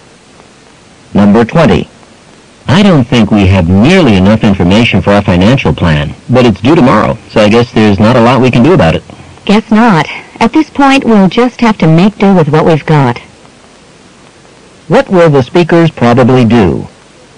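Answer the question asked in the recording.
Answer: Complete the plan with the information they have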